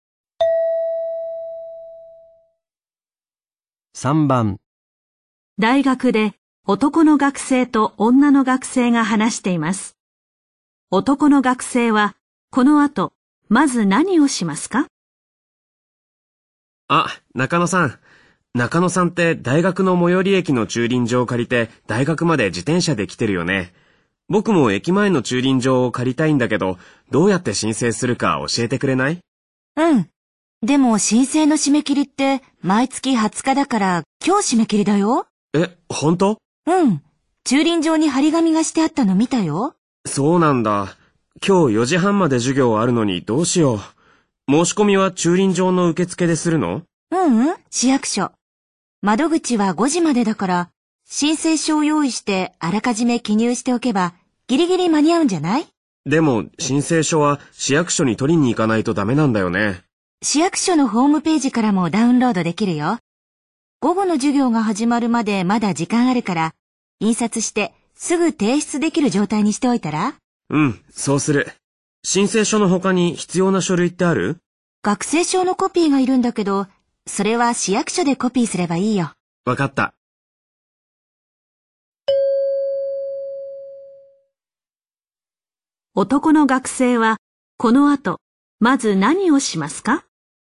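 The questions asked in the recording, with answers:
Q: 男の学生はこの後まず何をしますか?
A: 市役所のホームページから申請書をダウンロードして印刷し、記入しておく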